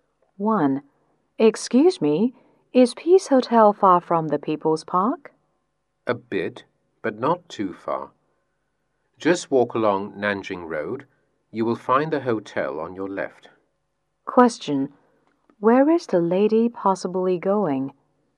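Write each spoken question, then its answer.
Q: Where is the lady possibly going?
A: Peace Hotel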